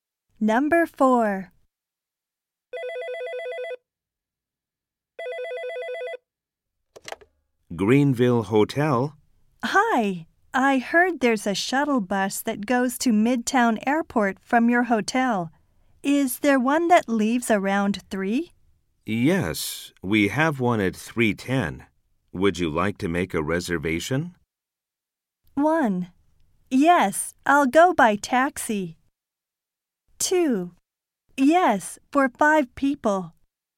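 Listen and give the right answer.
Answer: 2: Yes, for 5 people.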